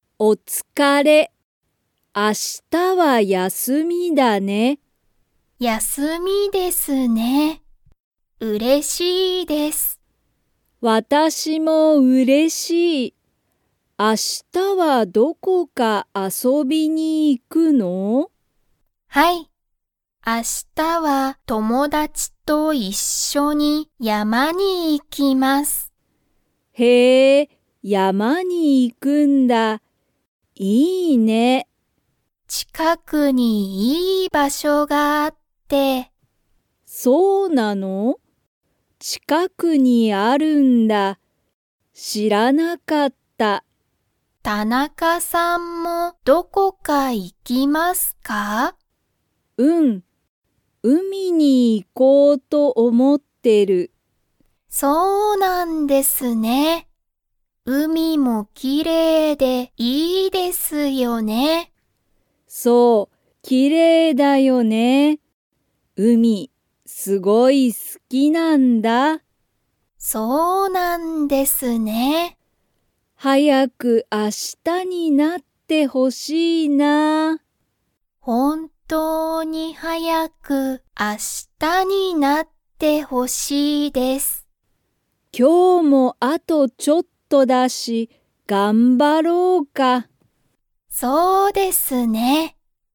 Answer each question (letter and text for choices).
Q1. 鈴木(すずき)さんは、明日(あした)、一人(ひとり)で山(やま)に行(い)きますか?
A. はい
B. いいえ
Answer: B. いいえ

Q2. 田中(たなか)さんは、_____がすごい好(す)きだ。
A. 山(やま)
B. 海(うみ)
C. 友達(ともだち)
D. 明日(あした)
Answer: B. 海(うみ)

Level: Level 2